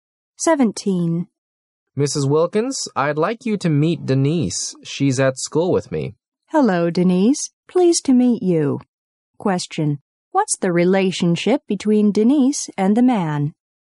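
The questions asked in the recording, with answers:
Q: what's the relationship between Denise and the man?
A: Schoolmates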